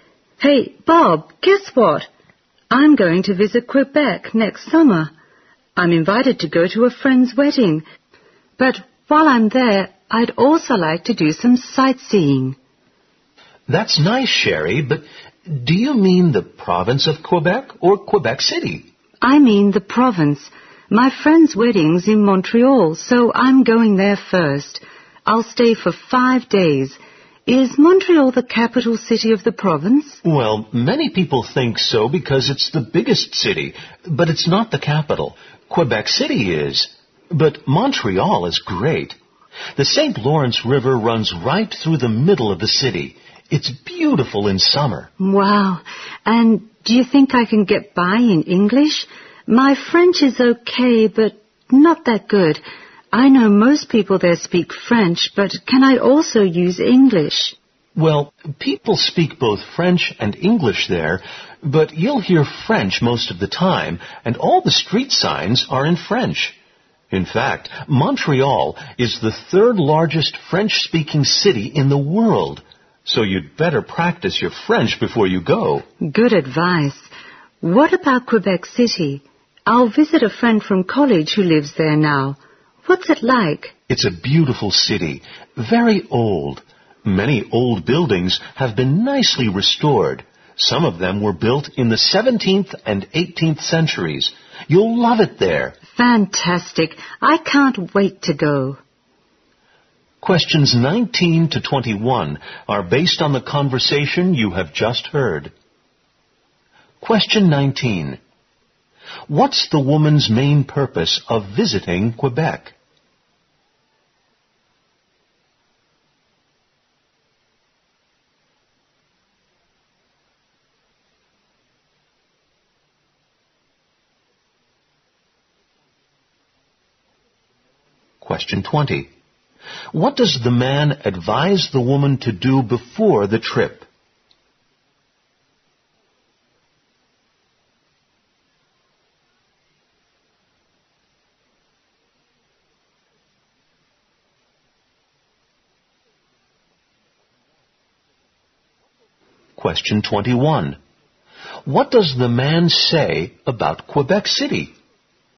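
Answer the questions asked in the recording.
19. To attend a friend's wedding
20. Practice her French
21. It's a beautiful old city with many restored old buildings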